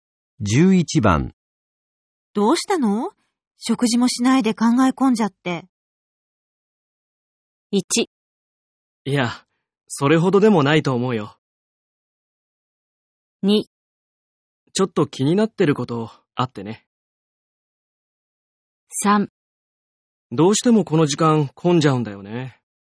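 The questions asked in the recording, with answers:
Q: どうしたの?食事もしないで考え込んじゃって。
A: 2: ちょっと気になってることあってね。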